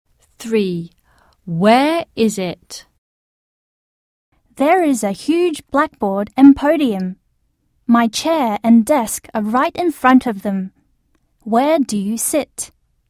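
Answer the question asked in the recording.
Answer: In a classroom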